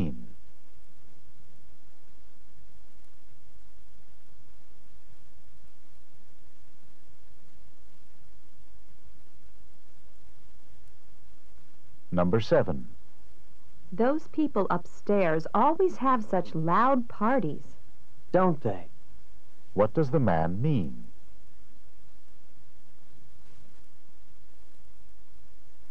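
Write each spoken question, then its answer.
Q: What does the man mean?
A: He agrees that the neighbors have loud parties.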